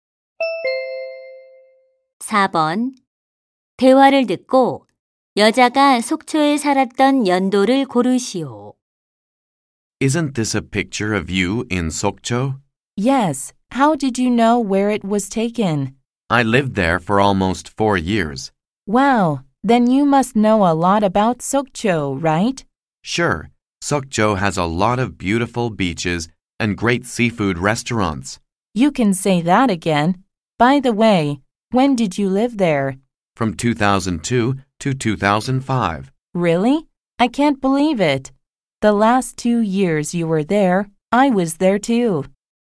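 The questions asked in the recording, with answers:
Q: 대화를 듣고 여자가 속초에 살았던 연도를 고르시오.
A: 2002년부터 2005년까지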